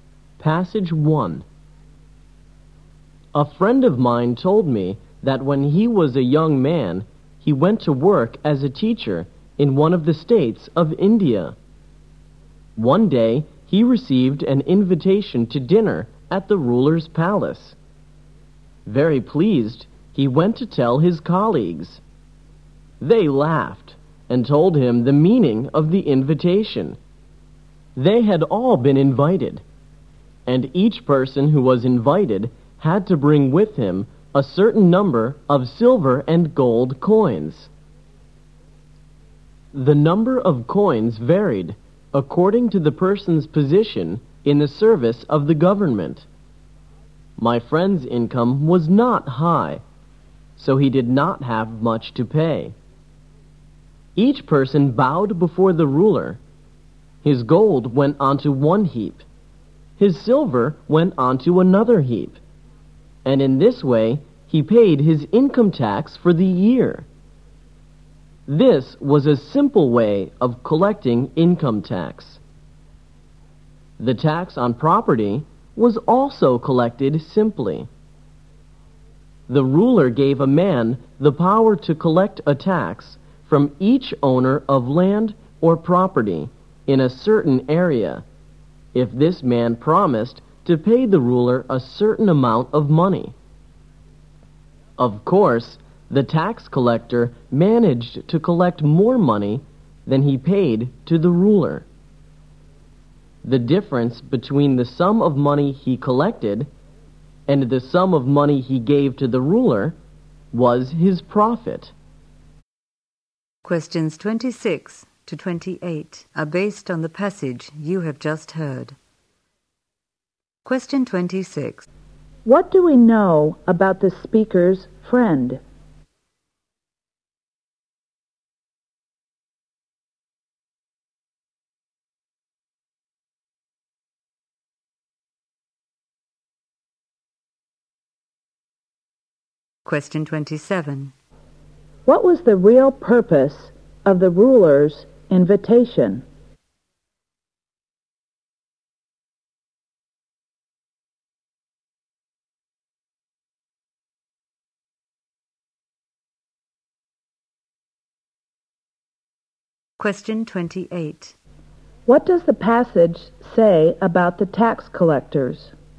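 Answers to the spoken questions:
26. He worked as a teacher in India and had a low income
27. To collect income tax
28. They collected more than they paid the ruler and kept the difference as profit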